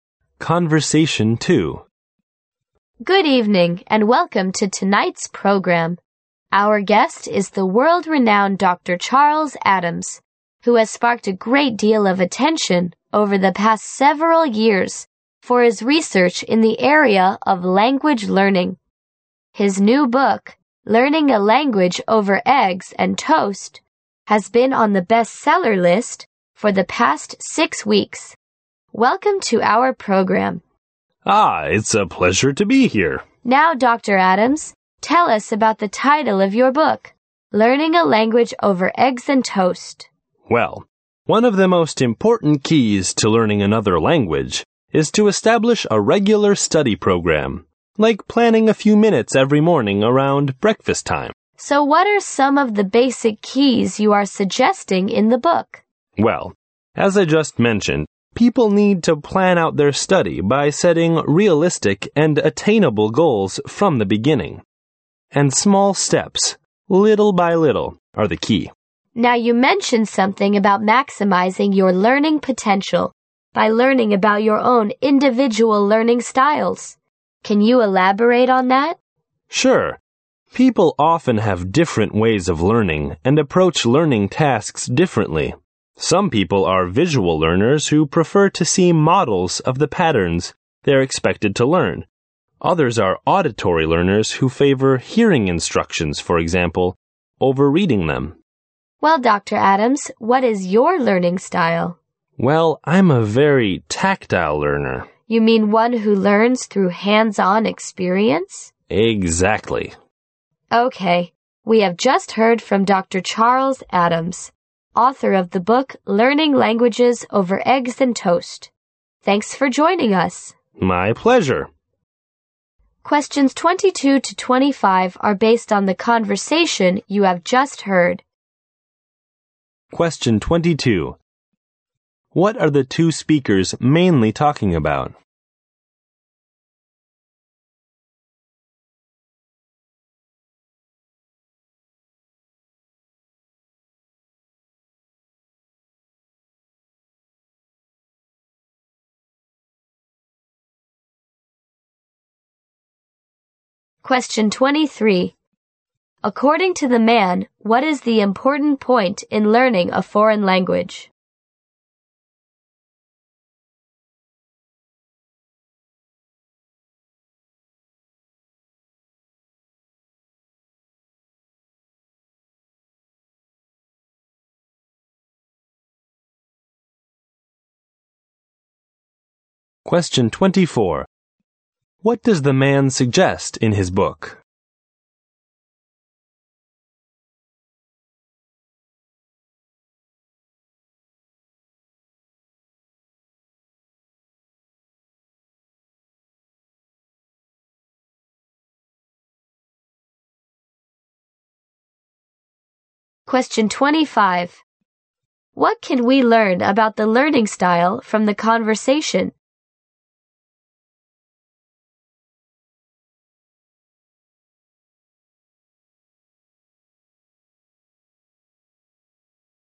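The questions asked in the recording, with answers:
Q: What are the two speakers mainly talking about?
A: Dr. Adams's new book on language learning

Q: According to the man, what is the important point in learning a foreign language?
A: Establishing a regular study program

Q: What does the man suggest in his book?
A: Setting realistic, attainable goals and taking small steps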